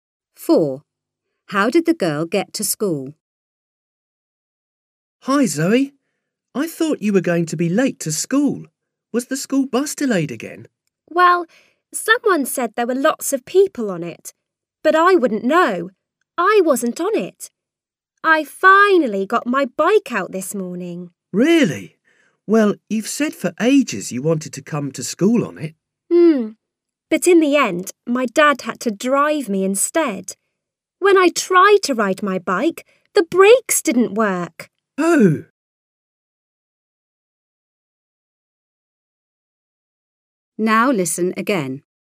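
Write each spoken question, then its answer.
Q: How did the girl get to school?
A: Her dad drove her by car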